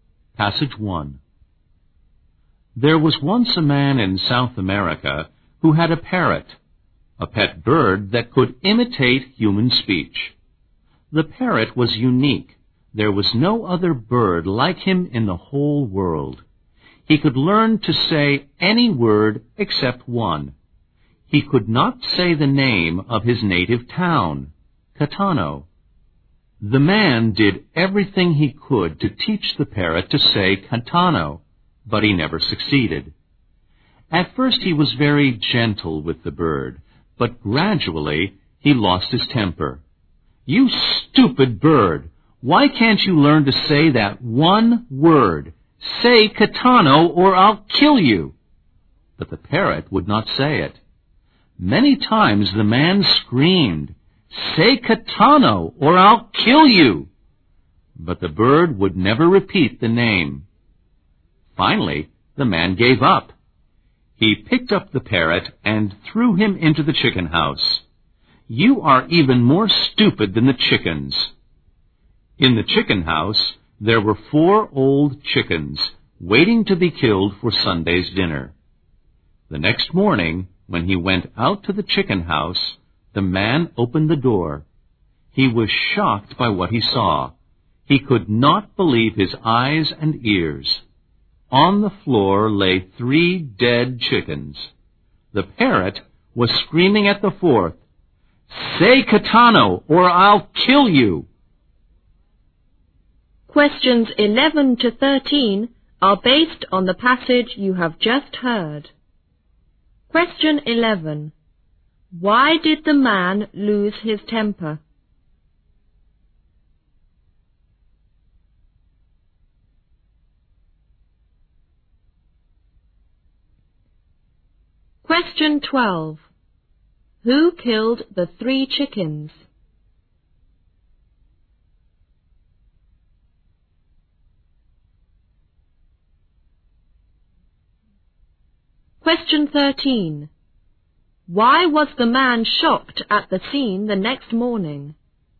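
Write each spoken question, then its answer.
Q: Why did the man lose his temper?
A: The parrot would not learn to say the name of his native town, Catano.

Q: Who killed the three chickens?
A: The parrot

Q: Why was the man shocked at the scene the next morning?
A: Three chickens were dead and the parrot was screaming at the fourth, "Say Catano or I'll kill you!"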